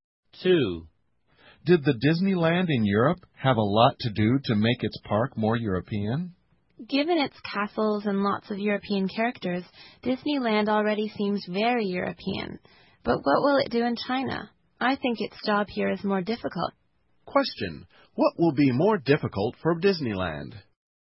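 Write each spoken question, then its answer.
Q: What will be more difficult for Disneyland?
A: Making its park in China feel Chinese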